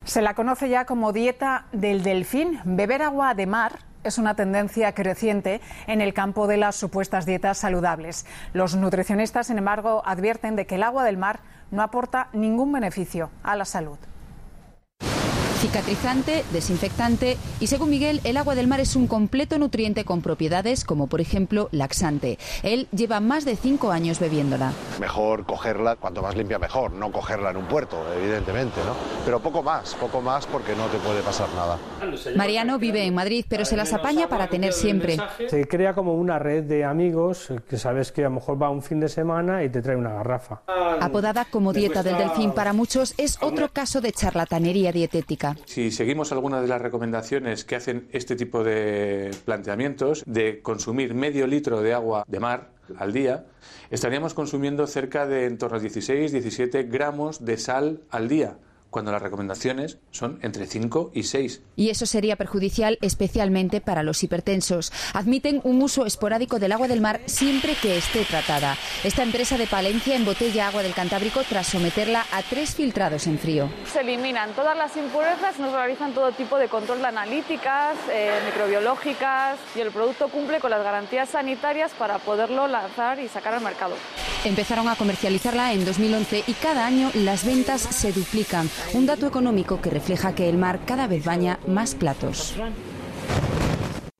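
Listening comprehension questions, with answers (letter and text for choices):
Escucha la primera parte del reportaje e indica la versión correcta.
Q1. Los nutricionistas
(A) admiten que el consumo de agua de mar tiene una ventaja clara.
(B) le ven pocos beneficios al consumo de agua de mar.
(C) no le ven ninguna ventaja al consumo de agua de mar.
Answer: (C) no le ven ninguna ventaja al consumo de agua de mar.

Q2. Entre los beneficios de la dieta del delfín mencionados en el reportaje no están sus propiedades...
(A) antisépticas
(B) purgativas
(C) adelgazantes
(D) cicatrizantes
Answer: (C) adelgazantes

Escucha otra vez y anota la información relacionada con las siguientes cifras.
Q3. 1/2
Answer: Se recomienda consumir medio litro de agua de mar al día.

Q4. 16 - 17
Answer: Se consumirían 16-17 gramos de sal al día.

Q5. 5 - 6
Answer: Las recomendaciones son entre 5 y 6 gramos de sal al día.

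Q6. x2(提到了两倍)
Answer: Cada año las ventas se duplican.

Escucha otra vez e indica las frases correctas.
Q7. Miguel desaconseja coger agua de mar en algunos lugares.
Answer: Correcta

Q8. Mariano necesita a sus amigos para tener siempre agua de mar.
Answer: Correcta

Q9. La empresa cántabra Lactoduero embotella agua de mar.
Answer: Incorrecta

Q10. Antes de embotellarla efectúan tres filtrados.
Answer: Correcta

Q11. En el proceso se calienta el agua a una temperatua alta durante un período muy breve.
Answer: Incorrecta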